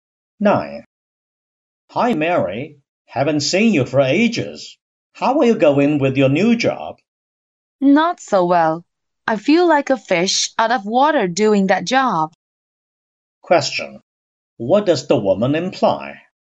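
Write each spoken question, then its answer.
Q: What does the woman imply?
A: She doesn't fit in her new job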